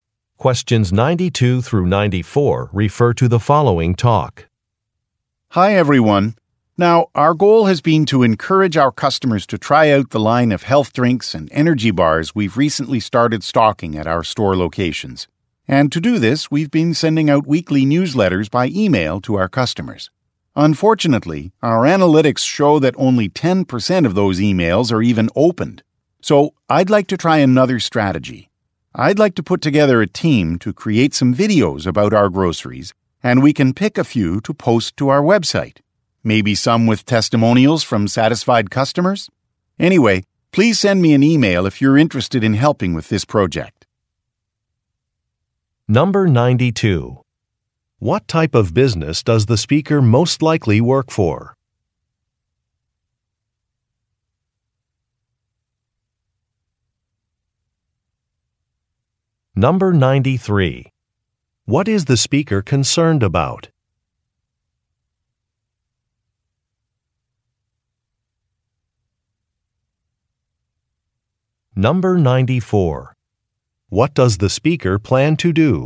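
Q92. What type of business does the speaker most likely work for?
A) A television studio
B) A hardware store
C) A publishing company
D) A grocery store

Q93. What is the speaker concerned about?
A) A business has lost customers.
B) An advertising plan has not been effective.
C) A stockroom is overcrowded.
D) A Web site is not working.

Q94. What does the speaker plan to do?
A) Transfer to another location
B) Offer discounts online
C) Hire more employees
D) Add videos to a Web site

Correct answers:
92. D) A grocery store
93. B) An advertising plan has not been effective.
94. D) Add videos to a Web site

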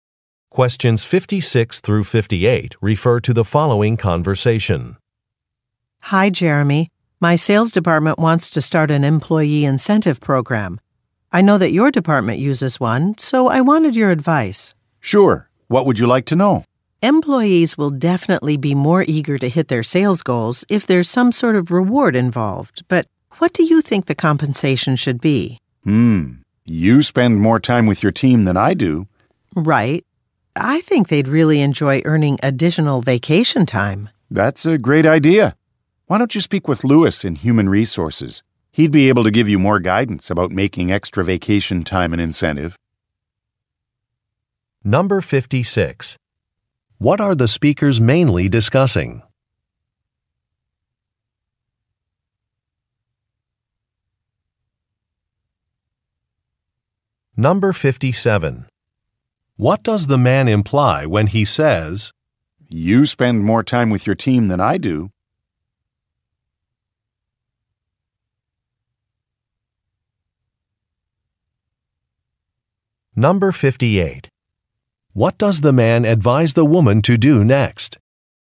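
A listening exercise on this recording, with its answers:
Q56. What are the speakers mainly discussing?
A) A focus group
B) Computer-use policies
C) An upcoming merger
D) Employee rewards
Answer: D) Employee rewards

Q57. What does the man imply when he says, "You spend more time with your team than I do"?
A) The woman's team requires more staff.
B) The woman should schedule fewer meetings.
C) The woman is the best person to decide.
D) The woman should have noticed a mistake.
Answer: C) The woman is the best person to decide.

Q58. What does the man advise the woman to do next?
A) Speak with a colleague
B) Research a competitor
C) Download an application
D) Attend a seminar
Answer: A) Speak with a colleague

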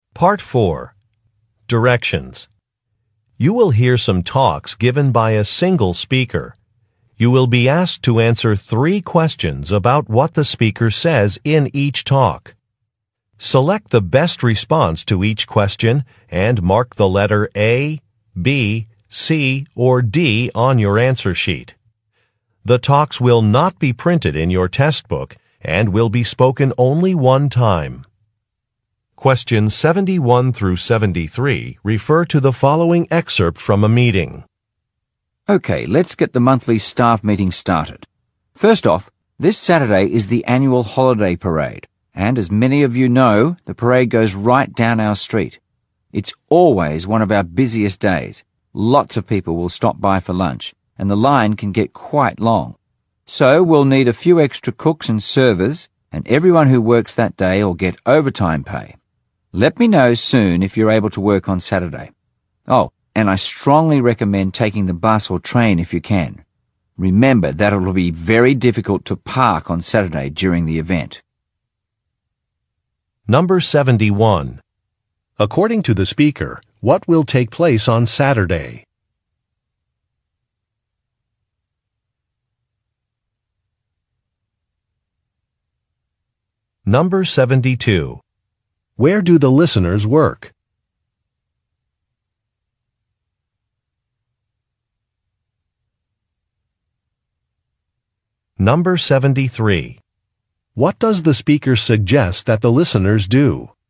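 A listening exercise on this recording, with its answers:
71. According to the speaker, what will take place on Saturday?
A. A retirement party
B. A holiday parade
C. A business workshop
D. A company picnic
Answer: B. A holiday parade

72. Where do the listeners work?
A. At a bank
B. At an amusement park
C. At a restaurant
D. At a police station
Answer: C. At a restaurant

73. What does the speaker suggest that the listeners do?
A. Wear warm clothing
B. Use public transportation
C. Pack a lunch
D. Bring identification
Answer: B. Use public transportation

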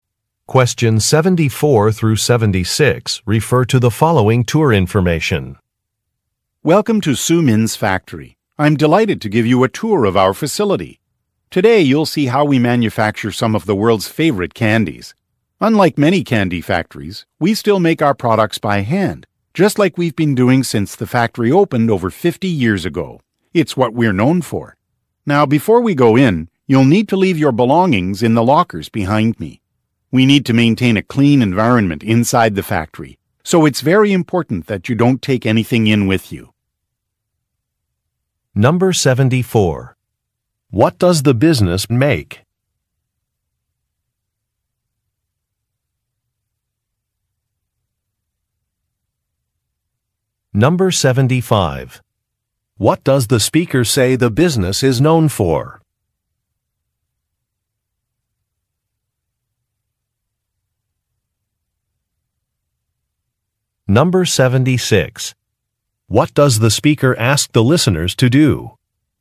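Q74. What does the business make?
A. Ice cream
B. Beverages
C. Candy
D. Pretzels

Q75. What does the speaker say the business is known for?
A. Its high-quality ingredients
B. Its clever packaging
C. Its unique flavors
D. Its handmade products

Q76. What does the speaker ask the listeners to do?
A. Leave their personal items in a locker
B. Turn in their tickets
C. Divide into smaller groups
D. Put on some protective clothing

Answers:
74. C. Candy
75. D. Its handmade products
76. A. Leave their personal items in a locker

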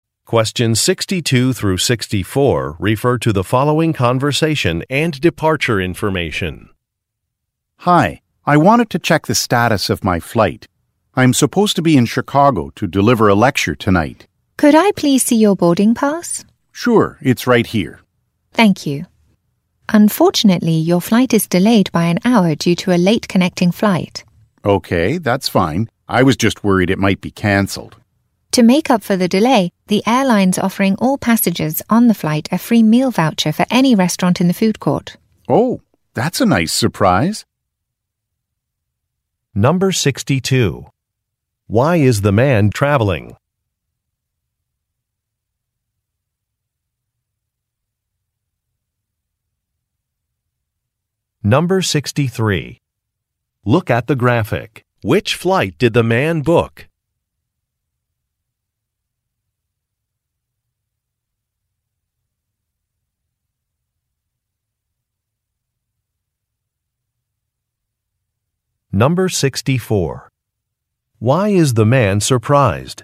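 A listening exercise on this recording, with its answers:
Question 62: Why is the man traveling?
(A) To view a property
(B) To participate in an interview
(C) To give a talk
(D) To visit family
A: (C) To give a talk

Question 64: Why is the man surprised?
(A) A refund will be issued.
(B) A departure gate has changed.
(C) A meal will not be served on a flight.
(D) A voucher will be provided.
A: (D) A voucher will be provided.

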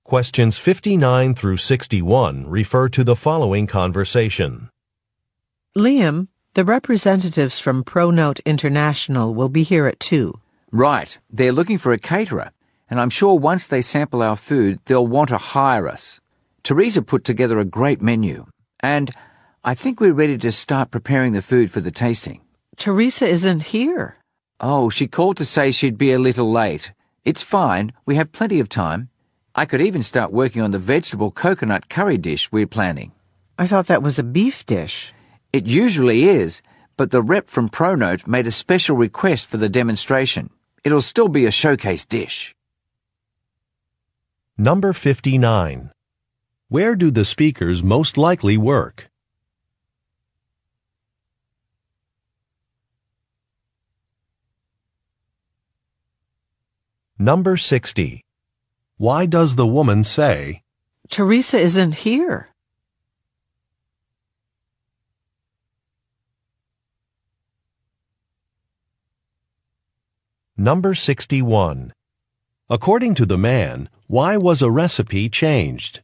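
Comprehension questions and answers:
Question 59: Where do the speakers most likely work?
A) At a farmer's market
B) At a catering company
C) At a home goods store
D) At a food manufacturer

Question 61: According to the man, why was a recipe changed?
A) Some ingredients were too expensive.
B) Some equipment was unavailable.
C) A new regulation was passed.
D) A client requested it.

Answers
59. B) At a catering company
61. D) A client requested it.

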